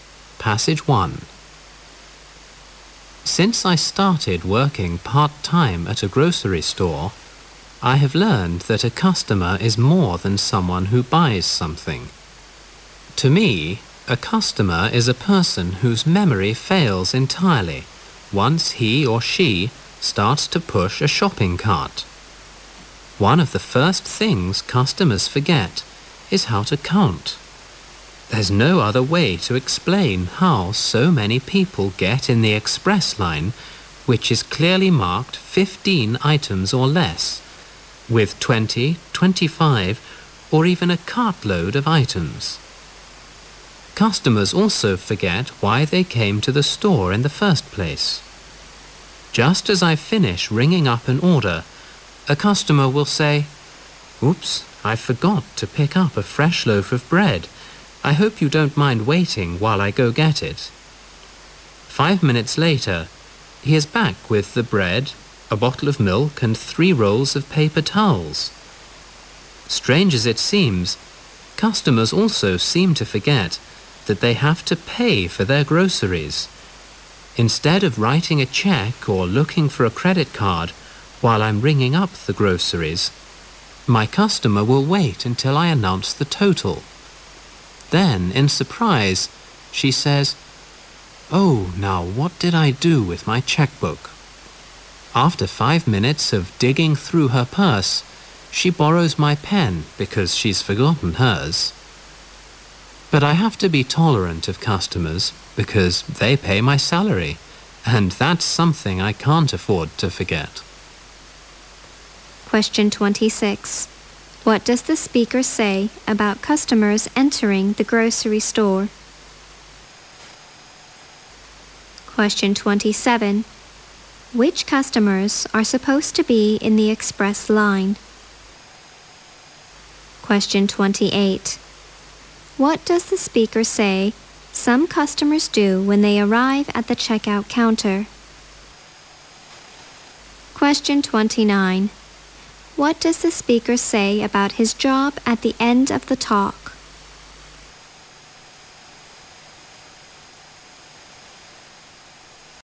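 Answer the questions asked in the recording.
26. Their memory fails once they start pushing a shopping cart.
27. Those with 15 items or less.
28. They wait until the total is announced before looking for a way to pay.
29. He has to be tolerant of customers because they pay his salary.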